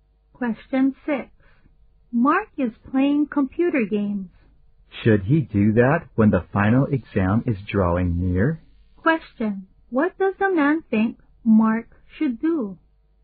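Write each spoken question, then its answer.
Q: What does the man think Mark should do?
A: Prepare for the final exam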